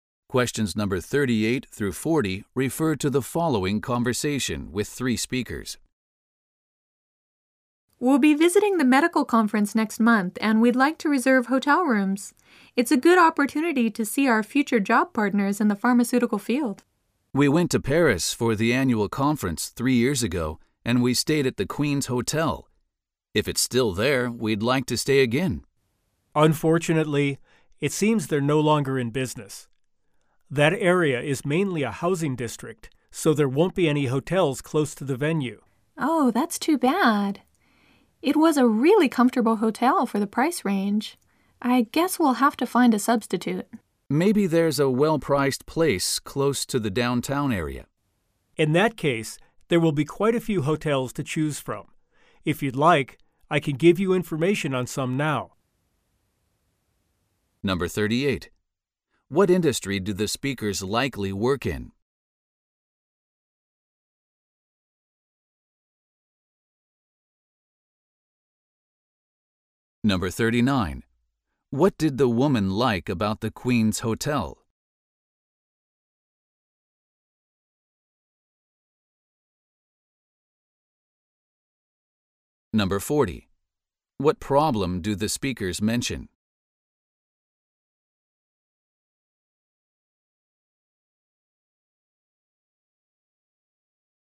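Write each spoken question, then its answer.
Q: What industry do the speakers likely work in?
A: Pharmaceuticals

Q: What did the woman like about the Queen's Hotel?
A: It was comfortable for the price

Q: What problem do the speakers mention?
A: The hotel they stayed at before is no longer in business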